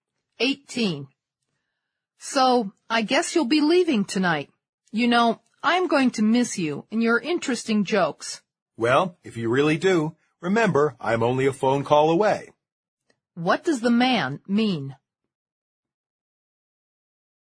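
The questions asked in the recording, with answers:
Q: What does the man mean?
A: The woman can call him any time if she misses him.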